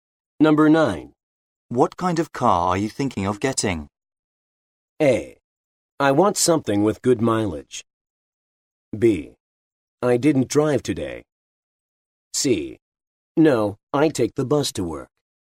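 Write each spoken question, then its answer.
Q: What kind of car are you thinking of getting?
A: A: I want something with good mileage.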